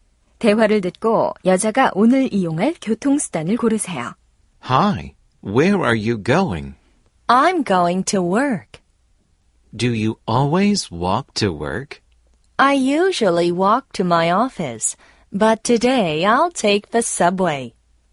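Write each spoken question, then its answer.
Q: 대화를 듣고 여자가 오늘 이용할 교통수단을 고르세요.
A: 지하철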